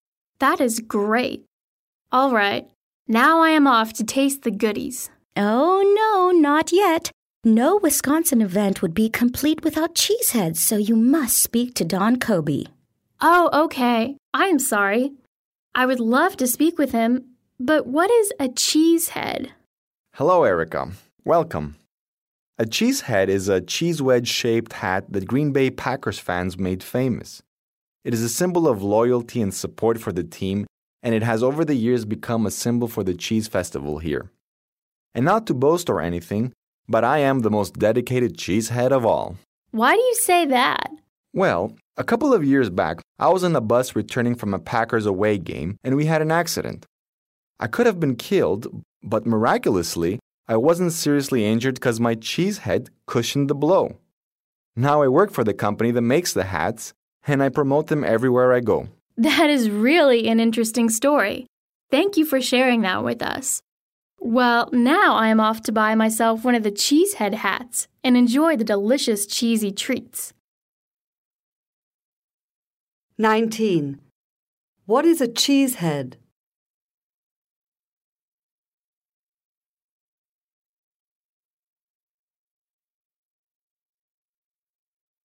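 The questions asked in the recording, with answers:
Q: What is a Cheesehead?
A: A hat shaped like a wedge of cheese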